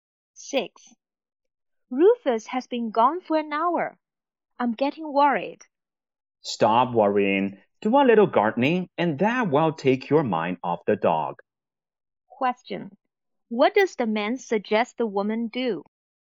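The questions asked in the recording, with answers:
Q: What does the man suggest the woman do?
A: Do some gardening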